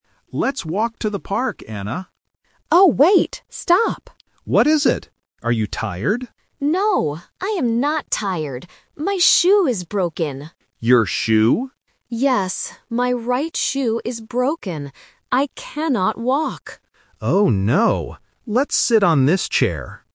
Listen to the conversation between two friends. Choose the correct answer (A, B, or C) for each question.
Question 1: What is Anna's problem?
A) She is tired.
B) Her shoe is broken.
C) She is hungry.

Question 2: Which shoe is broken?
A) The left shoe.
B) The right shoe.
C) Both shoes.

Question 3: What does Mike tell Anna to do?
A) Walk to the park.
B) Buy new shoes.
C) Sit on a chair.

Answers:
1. B) Her shoe is broken.
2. B) The right shoe.
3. C) Sit on a chair.

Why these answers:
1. Anna clearly says, "My shoe is broken." Option A (She is tired) is the trap because Mike asks "Are you tired?", but Anna explicitly answers "No, I am not tired." Option C is not mentioned.
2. Anna specifies the problem by saying, "my right shoe is broken." Option A (The left shoe) is a plausible guess but is not mentioned. Option C is incorrect because only one shoe is broken.
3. At the end of the conversation, Mike says, "Let's sit on this chair." Option A (Walk to the park) is the trap because Mike suggests this at the very beginning, but the plan changes when Anna cannot walk. Option B is not mentioned.

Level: A1

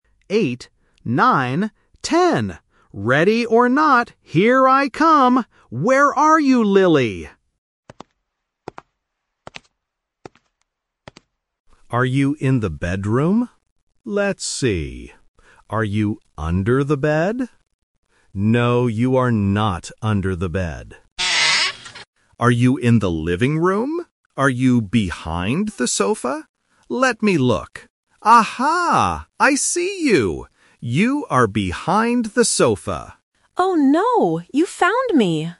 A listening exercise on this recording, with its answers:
Listen to the audio and choose the correct answer (A, B, or C).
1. Which room does Tommy check first?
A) The bedroom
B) The living room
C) The kitchen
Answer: A) The bedroom

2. Where does Tommy look in the bedroom?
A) In the closet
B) Under the bed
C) Behind the door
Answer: B) Under the bed

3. Where is Lily hiding?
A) Under the bed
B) Behind the sofa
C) Behind the TV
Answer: B) Behind the sofa

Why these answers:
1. Tommy asks, "Are you in the bedroom?" before checking the bed. Option (B) "The living room" is the trap because he goes there second. Option (C) "The kitchen" is a plausible room but it is never mentioned.
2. Tommy specifically says, "Are you under the bed? No, you are not under the bed." Option (A) "In the closet" and Option (C) "Behind the door" are plausible hiding places in a bedroom, but they are not mentioned in the audio.
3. Tommy says, "Aha! I see you! You are behind the sofa!" Option (A) "Under the bed" is the trap because it was mentioned earlier but rejected (he didn't find her there). Option (C) "Behind the TV" is plausible but not mentioned.

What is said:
Tommy: ...Eight, nine, ten! Ready or not, here I come! Where are you, Lily?
Tommy: Are you in the bedroom? Let's see. Are you under the bed? No, you are not under the bed.
Are you behind the sofa? Let me look... Aha! I see you! You are behind the sofa!

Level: A1

